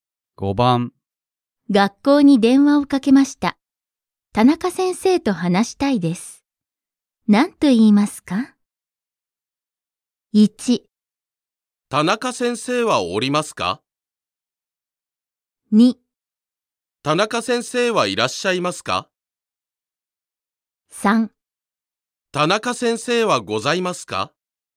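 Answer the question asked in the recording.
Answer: 2: 田中先生はいらっしゃいますか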